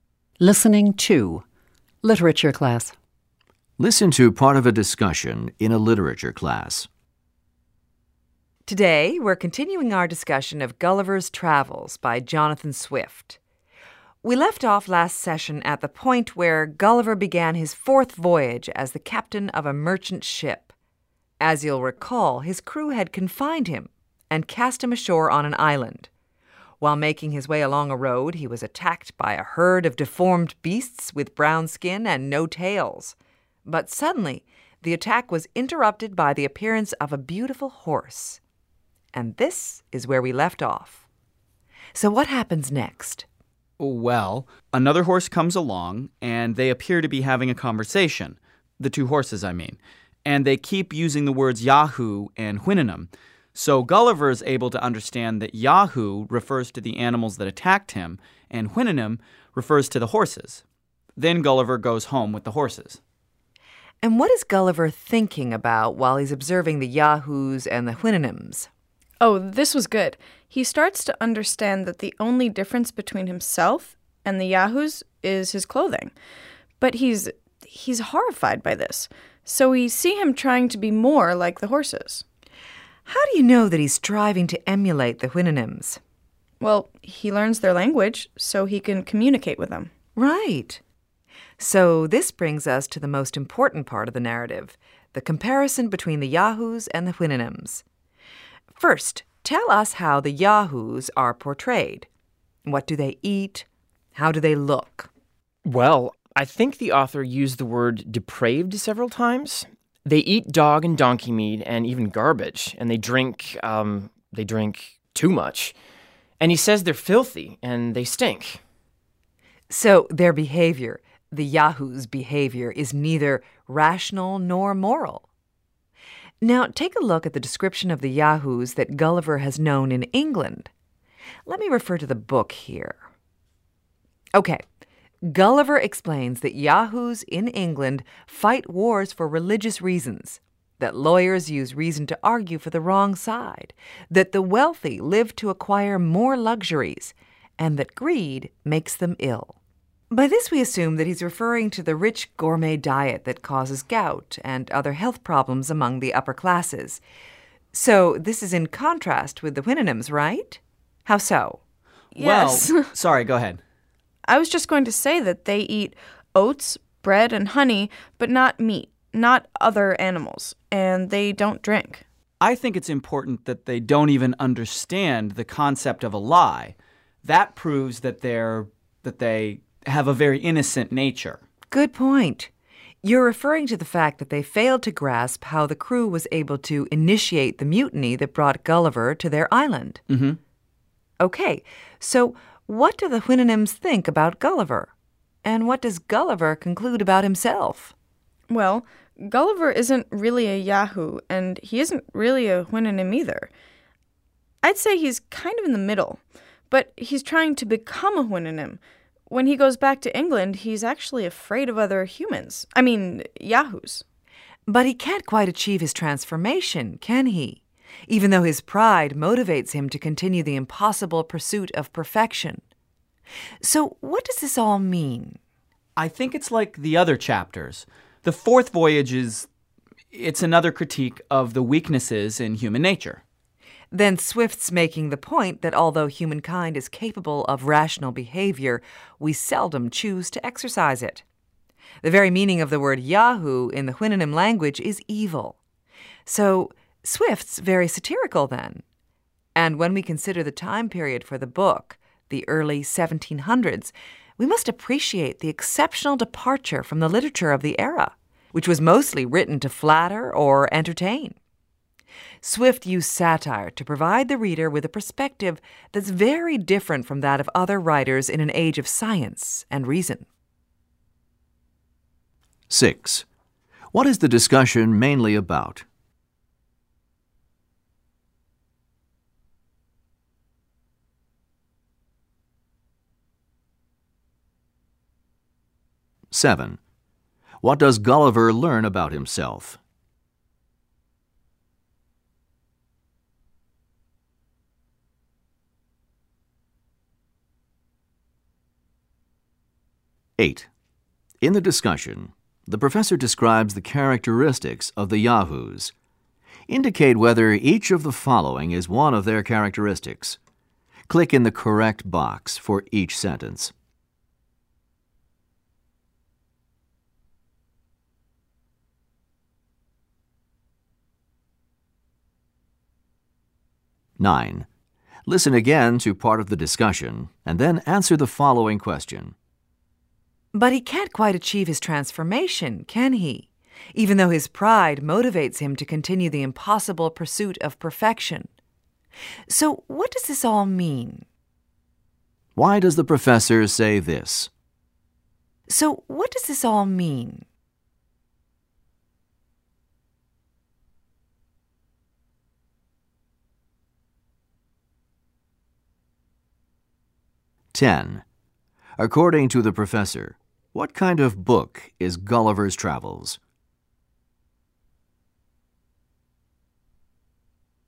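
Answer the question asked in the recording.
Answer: A satire, a critique of human nature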